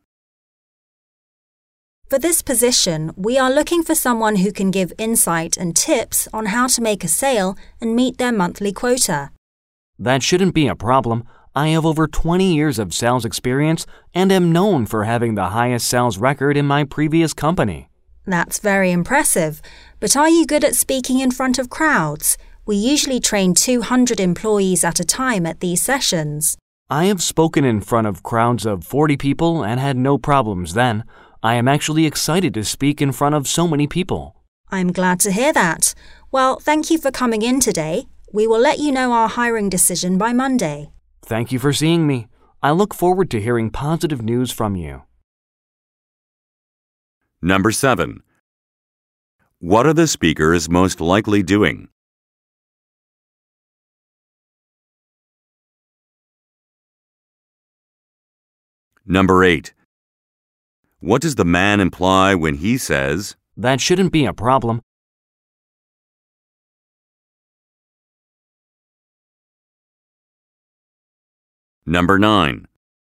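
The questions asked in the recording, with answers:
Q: What are the speakers most likely doing?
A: Having a job interview

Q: What does the man imply when he says,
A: He is confident he can give sales tips and help people meet their quotas

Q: What will happen on Monday?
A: The man will be told the hiring decision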